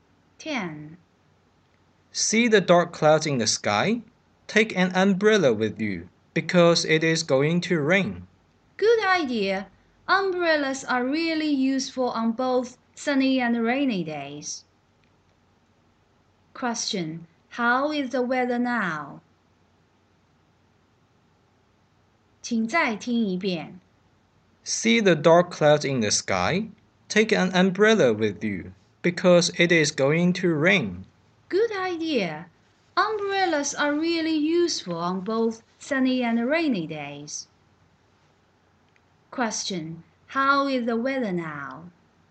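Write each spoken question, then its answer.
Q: Question. How is the weather now?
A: Cloudy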